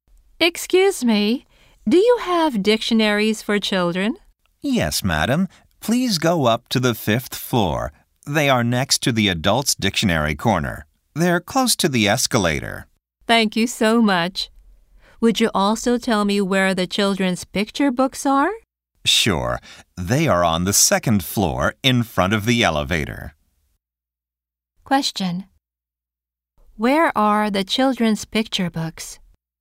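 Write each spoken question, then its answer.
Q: Where are the children's picture books?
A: On the second floor in front of the elevator.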